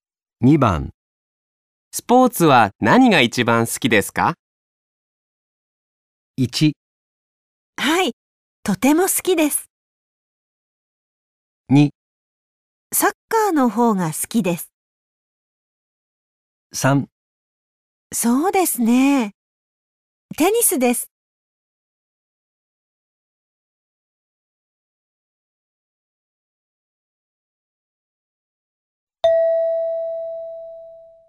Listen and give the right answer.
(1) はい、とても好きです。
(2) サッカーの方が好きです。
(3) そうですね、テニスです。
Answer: (3) そうですね、テニスです。

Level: N5 Listening · Test 3